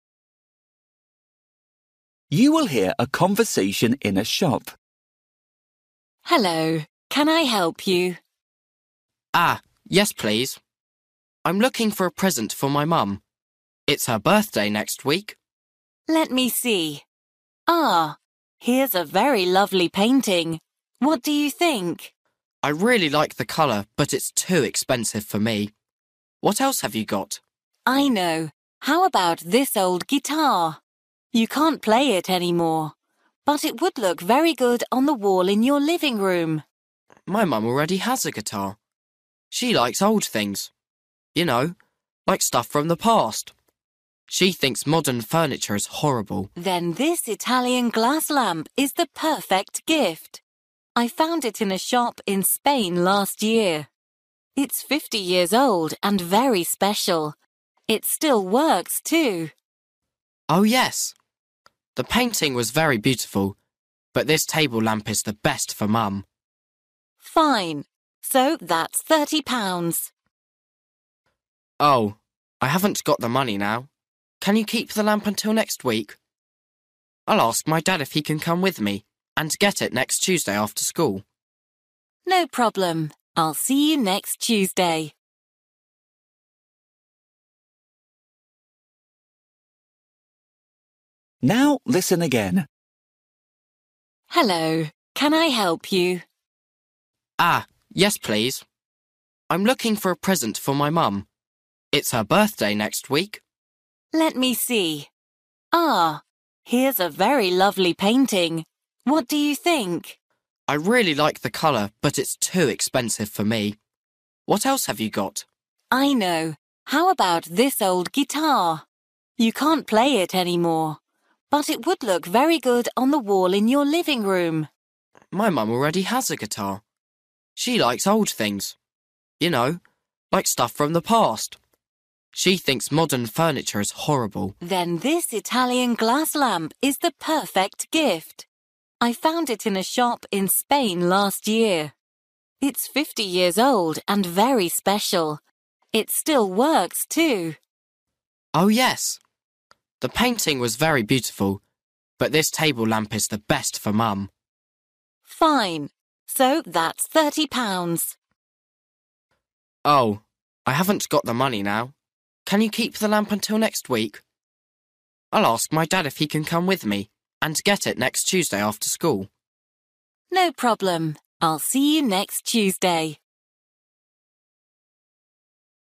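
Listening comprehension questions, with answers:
For each question, choose the correct answer.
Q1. The lovely painting is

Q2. The old guitar is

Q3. The table lamp is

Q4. Kevin thinks that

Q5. In the end Kevin decides to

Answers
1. too expensive
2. impossible to play any more
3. 50 years old and still works
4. the table lamp is the best present for his mum
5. come back with his dad next Tuesday to get the lamp

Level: Luyện nghe trình độ A2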